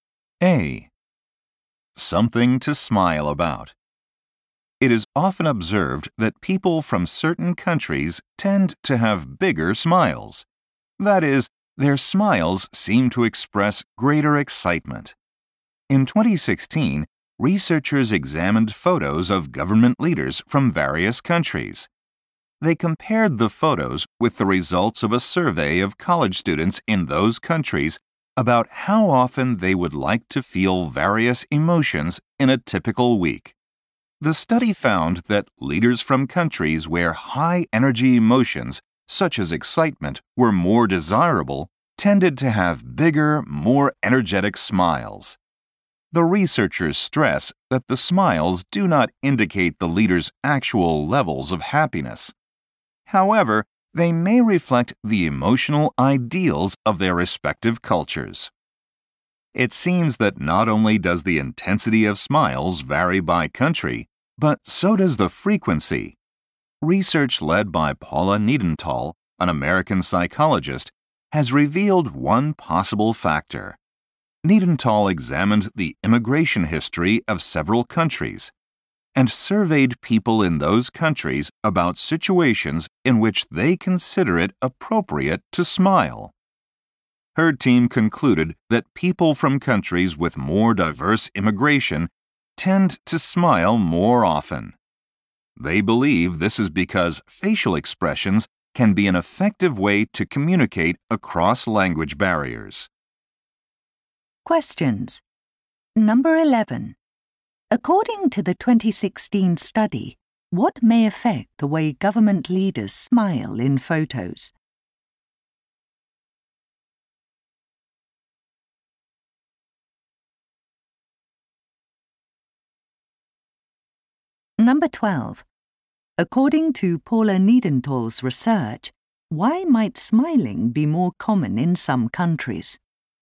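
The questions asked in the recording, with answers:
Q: According to the 2016 study, what may affect the way government leaders smile in photos?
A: The emotions their culture considers ideal or desirable

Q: According to Paula Niedenthal's research, why might smiling be more common in some countries?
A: More diverse immigration makes smiles useful for communicating across language barriers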